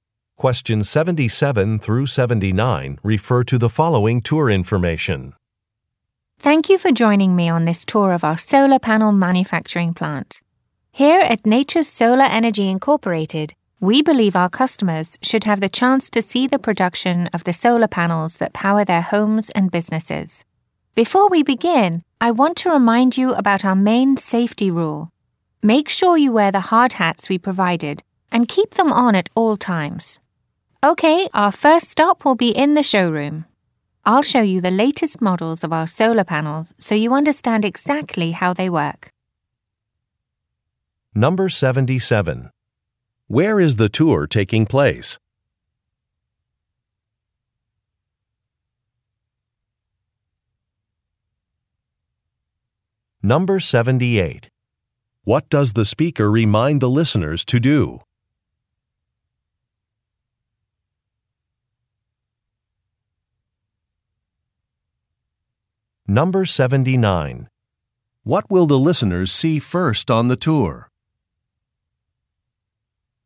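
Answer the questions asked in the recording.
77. At a solar panel manufacturing plant
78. Wear hard hats at all times
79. The latest solar panel models in the showroom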